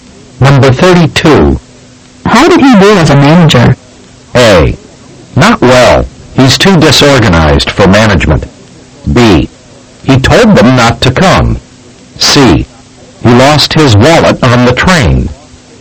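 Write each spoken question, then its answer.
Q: How did he do as a manager?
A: A: Not well. He's too disorganized for management.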